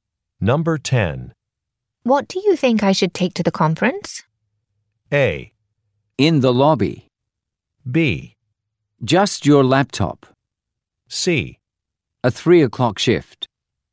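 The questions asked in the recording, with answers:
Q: What do you think I should take to the conference?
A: B: Just your laptop.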